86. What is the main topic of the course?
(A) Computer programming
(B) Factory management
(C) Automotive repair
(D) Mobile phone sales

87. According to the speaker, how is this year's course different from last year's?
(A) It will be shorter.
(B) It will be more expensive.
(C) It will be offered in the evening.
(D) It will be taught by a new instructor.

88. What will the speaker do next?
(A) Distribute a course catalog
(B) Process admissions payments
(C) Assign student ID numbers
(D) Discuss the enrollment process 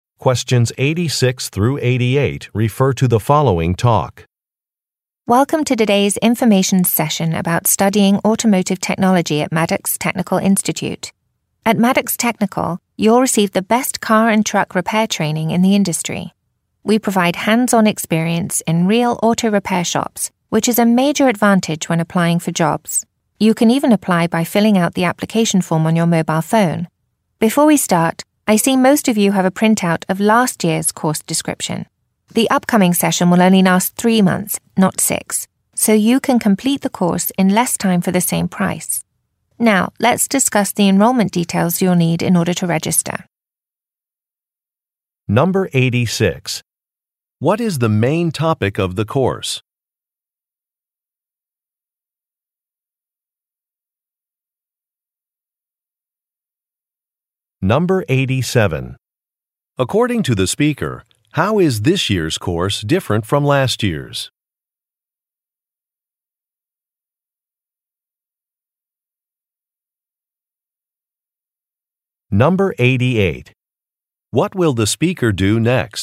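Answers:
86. C
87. A
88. D

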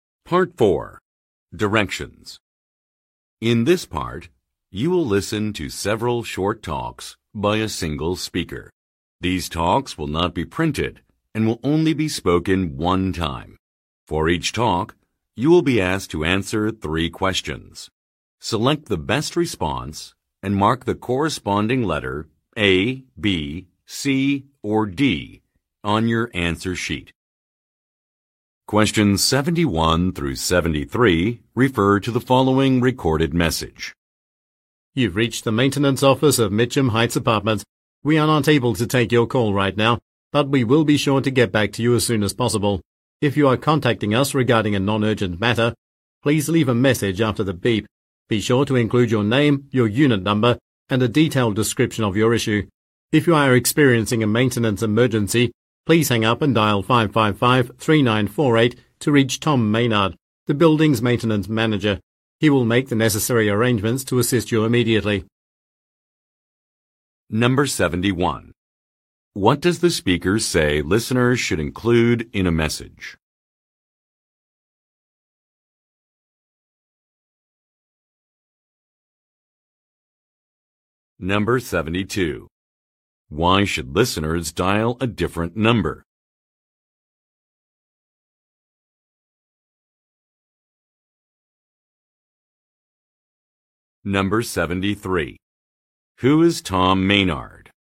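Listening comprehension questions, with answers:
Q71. What does the speaker say listeners should include in a message?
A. A building name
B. A unit number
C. An available date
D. A price range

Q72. Why should listeners dial a different number?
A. To learn about available units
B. To set up an automatic payment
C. To report an emergency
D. To offer some feedback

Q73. Who is Tom Meynard?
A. A building owner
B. A leasing agent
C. An administrative assistant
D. A maintenance supervisor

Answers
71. B
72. C
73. D

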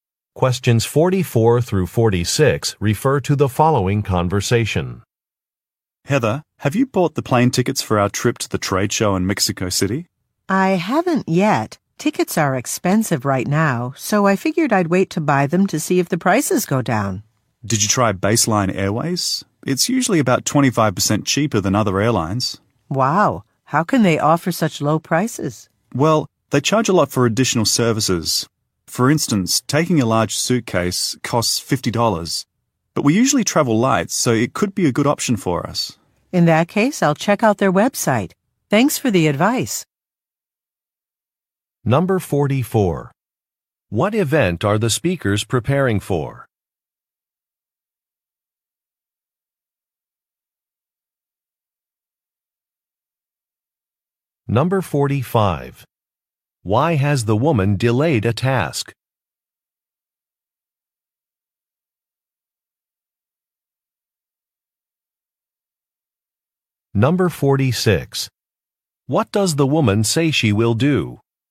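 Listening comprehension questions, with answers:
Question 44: What event are the speakers preparing for?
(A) A trade show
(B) A factory visit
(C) A grand opening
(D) A product launch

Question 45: Why has the woman delayed a task?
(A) There was a data-entry mistake.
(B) A registration form was missing.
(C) Ticket prices are expensive.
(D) Attendance rates are too low.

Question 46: What does the woman say she will do?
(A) Review a presentation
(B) Look at a Web site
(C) Print an itinerary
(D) Pick up a client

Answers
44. A
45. C
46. B

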